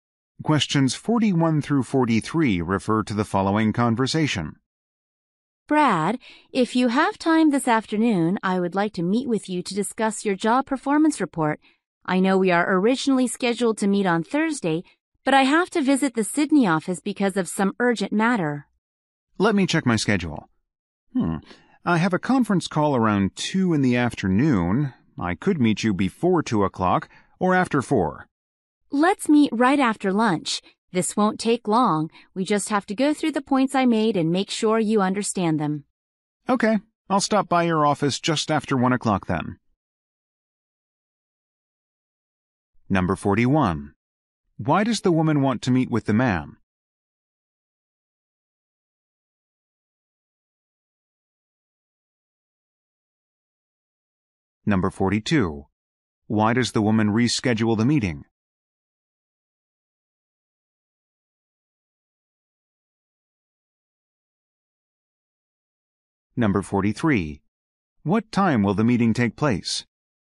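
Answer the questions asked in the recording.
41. To discuss his job performance report
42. She has to visit the Sydney office for an urgent matter
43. Just after 1 o'clock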